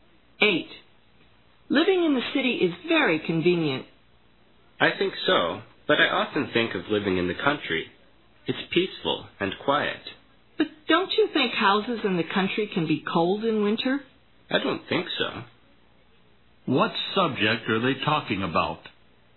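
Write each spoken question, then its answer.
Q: What subject are they talking about?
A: Living in the city versus the country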